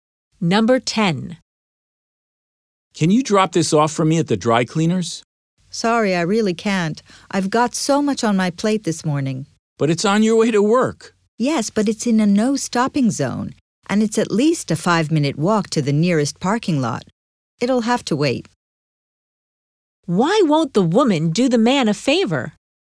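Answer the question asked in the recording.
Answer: She can't stop near the dry cleaners and parking is too far away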